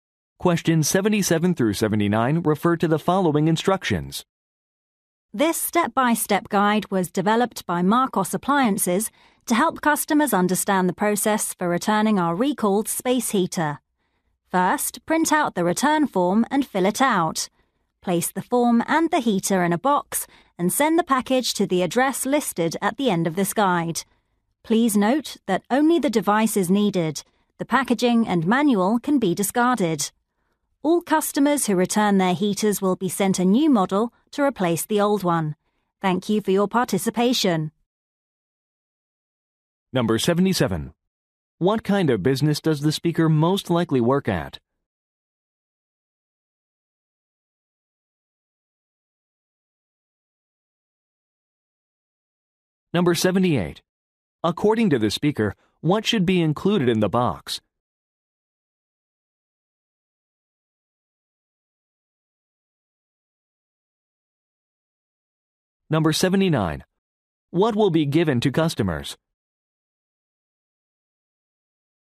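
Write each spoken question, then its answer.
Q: What kind of business does the speaker most likely work at?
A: An appliance manufacturer

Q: According to the speaker, what should be included in the box?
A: The return form and the heater

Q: What will be given to customers?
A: A new replacement model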